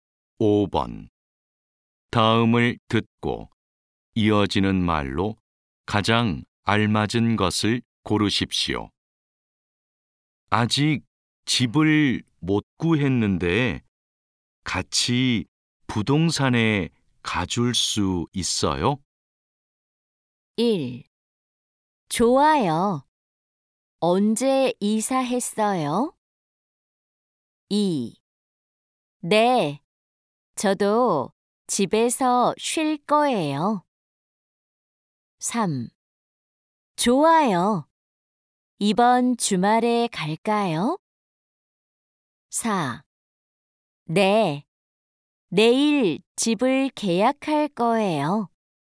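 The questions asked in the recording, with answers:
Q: 아직 집을 못 구했는데 같이 부동산에 가줄 수 있어요?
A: 3: 좋아요. 이번 주말에 갈까요?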